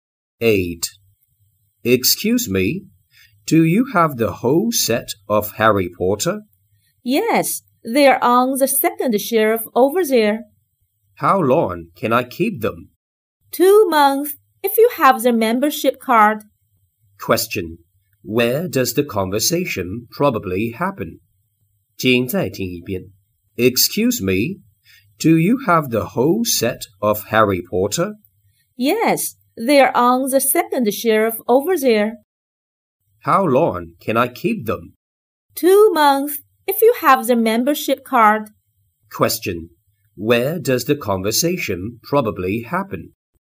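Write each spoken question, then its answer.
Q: Where does the conversation probably happen?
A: In a library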